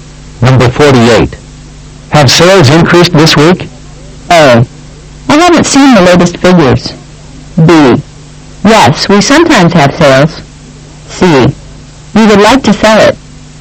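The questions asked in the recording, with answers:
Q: Have sales increased this week?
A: A: I haven't seen the latest figures.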